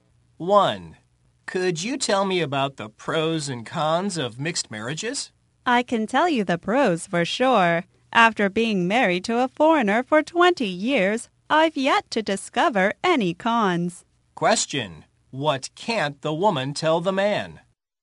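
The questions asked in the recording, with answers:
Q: What can't the woman tell the man?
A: The cons of mixed marriages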